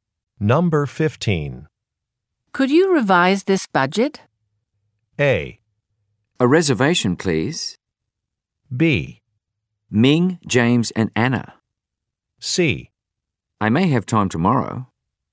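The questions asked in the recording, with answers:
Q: Could you revise this budget?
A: C: I may have time tomorrow.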